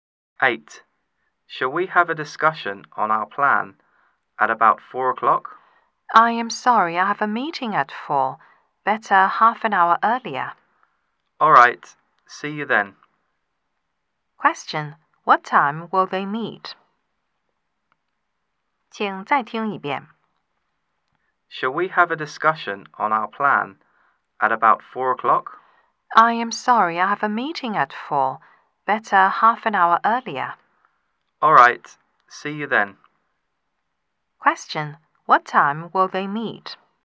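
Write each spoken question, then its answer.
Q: Question. What time will they meet?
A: At 3:30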